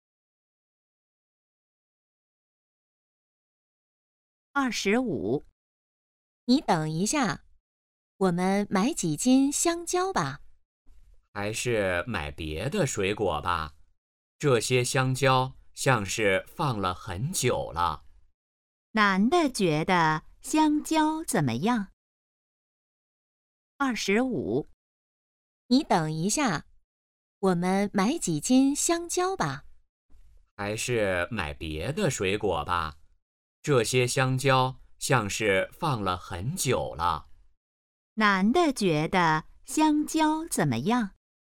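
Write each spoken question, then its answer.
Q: 男的觉得香蕉怎么样?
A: 放了很久了,不新鲜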